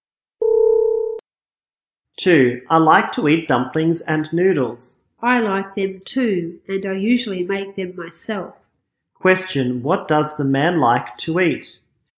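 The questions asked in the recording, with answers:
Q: what does the man like to eat?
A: Dumplings and noodles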